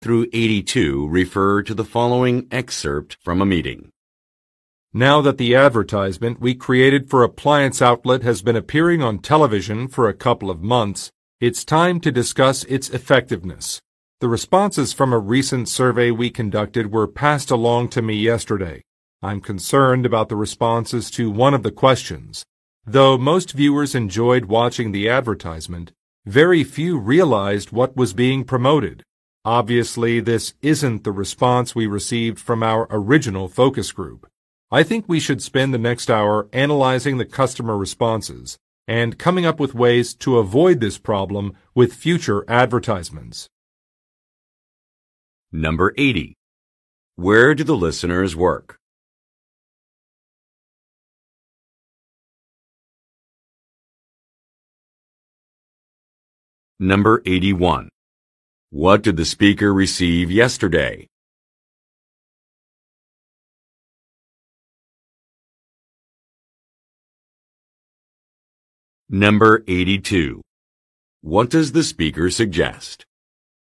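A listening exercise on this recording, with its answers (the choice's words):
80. Where do the listeners work?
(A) At a manufacturing facility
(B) At a retail outlet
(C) At an advertising agency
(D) At a television studio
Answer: At an advertising agency

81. What did the speaker receive yesterday?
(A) Some billing statements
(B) Some complimentary samples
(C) Some questionnaire results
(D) Some promotional flyers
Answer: Some questionnaire results

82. What does the speaker suggest?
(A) Handing out products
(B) Brainstorming ideas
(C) Assembling a focus group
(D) Screening a second commercial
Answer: Brainstorming ideas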